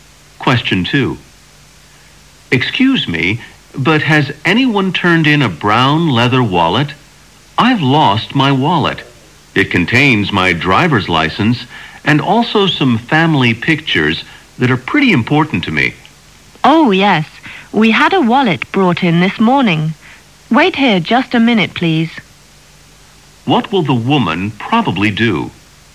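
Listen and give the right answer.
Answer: Get the wallet that was brought in to see if it is the man's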